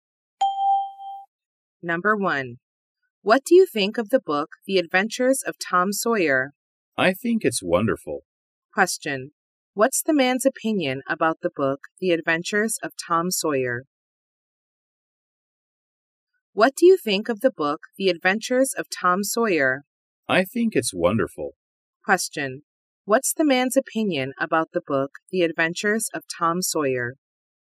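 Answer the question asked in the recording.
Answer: It's wonderful.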